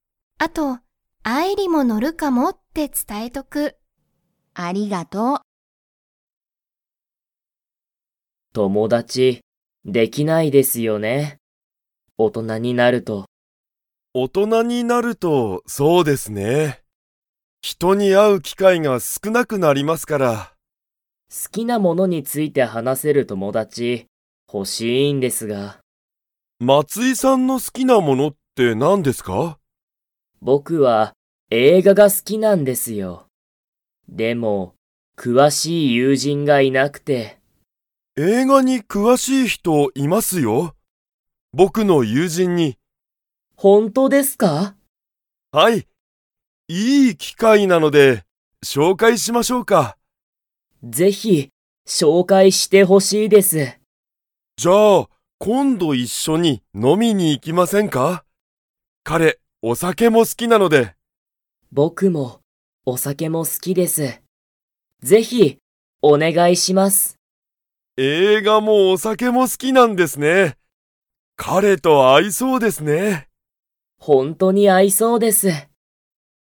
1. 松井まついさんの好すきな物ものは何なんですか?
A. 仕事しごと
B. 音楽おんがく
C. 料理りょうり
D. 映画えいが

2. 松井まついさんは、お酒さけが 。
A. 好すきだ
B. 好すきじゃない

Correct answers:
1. D
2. A

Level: Level 3

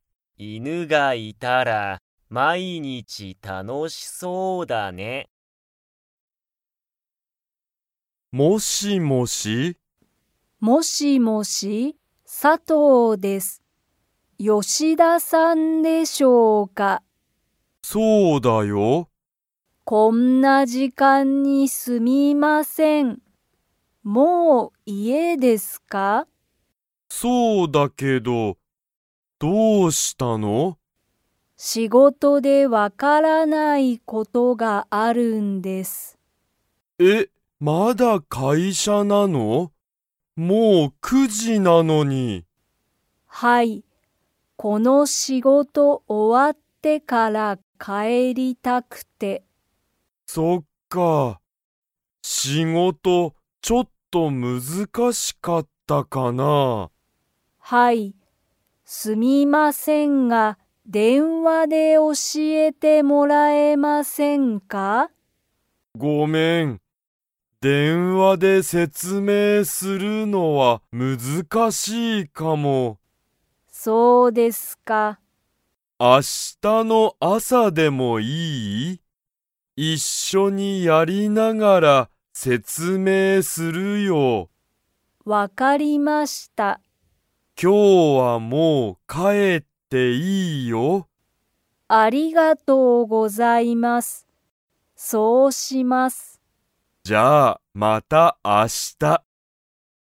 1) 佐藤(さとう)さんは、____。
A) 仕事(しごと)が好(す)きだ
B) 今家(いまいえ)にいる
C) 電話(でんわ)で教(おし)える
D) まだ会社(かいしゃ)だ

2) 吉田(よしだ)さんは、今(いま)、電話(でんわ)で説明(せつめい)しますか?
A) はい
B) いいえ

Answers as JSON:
{"1": "D", "2": "B"}

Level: Level 2

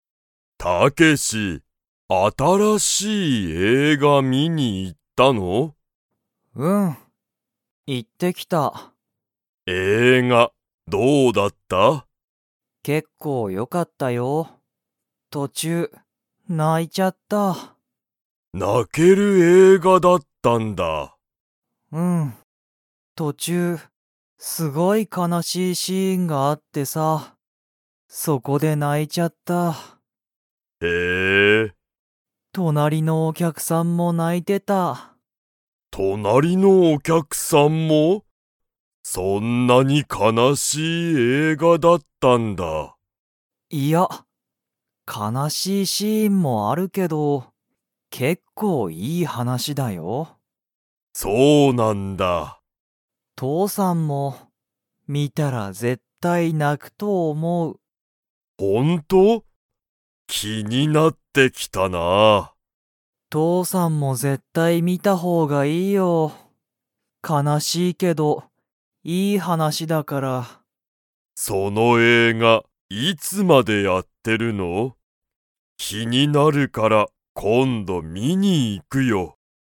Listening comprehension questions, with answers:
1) 映画えいがは、途中とちゅうで シーンがあった。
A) 楽たのしい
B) 悲かなしい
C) 怖こわい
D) 新あたらしい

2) タケシは、映画えいがの途中とちゅうで泣なきましたか?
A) はい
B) いいえ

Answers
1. B
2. A

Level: Level 3

